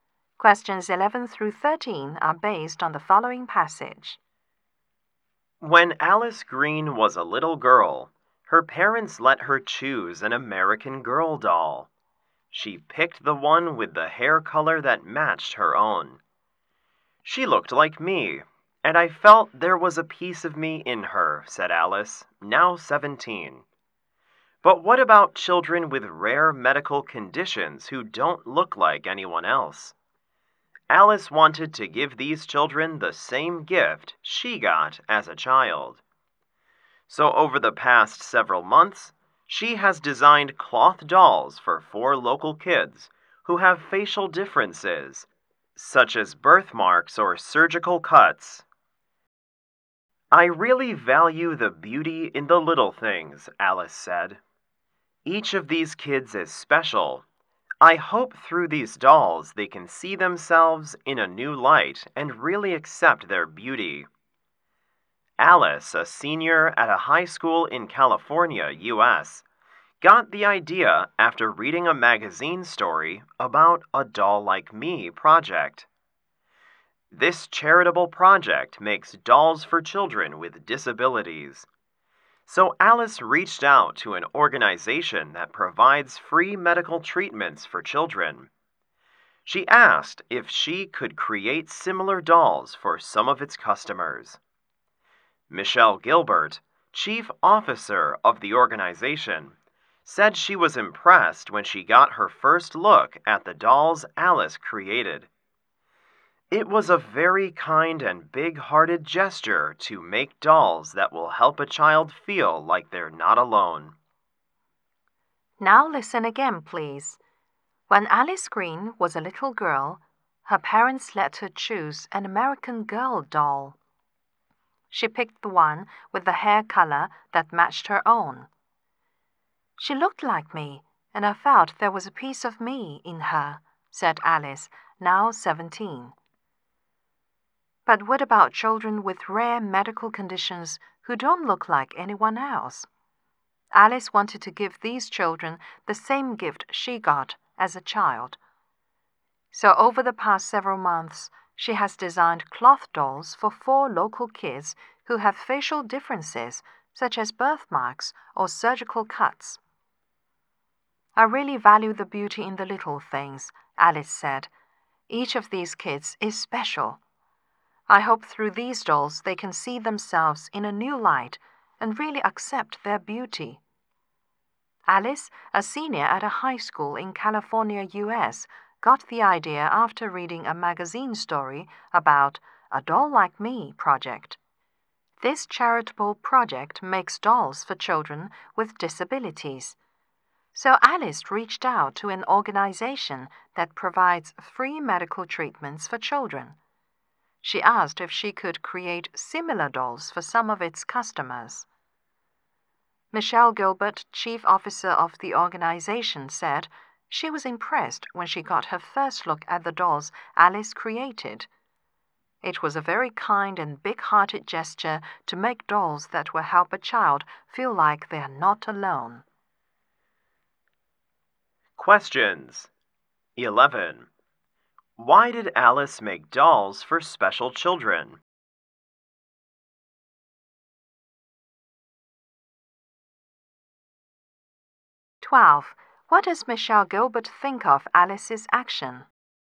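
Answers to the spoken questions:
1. To help children with facial differences see themselves in a new light and accept their beauty
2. It was kind and big-hearted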